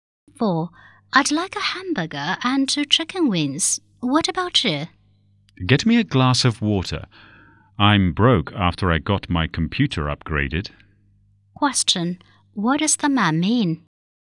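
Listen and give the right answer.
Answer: He has no money, so he only wants a glass of water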